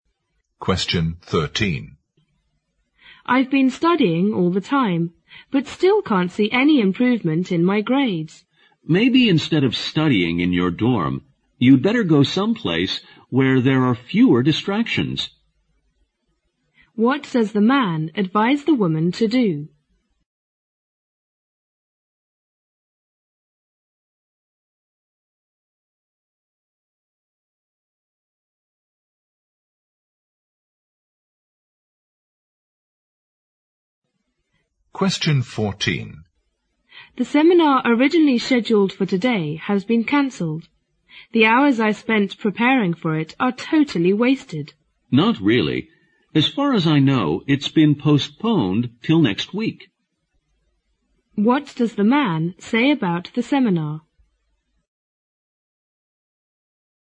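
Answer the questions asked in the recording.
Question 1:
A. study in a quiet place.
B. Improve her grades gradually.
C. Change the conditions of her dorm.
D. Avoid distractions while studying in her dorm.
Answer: A. study in a quiet place.
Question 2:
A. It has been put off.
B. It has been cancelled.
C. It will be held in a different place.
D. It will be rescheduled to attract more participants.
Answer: A. It has been put off.

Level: 六级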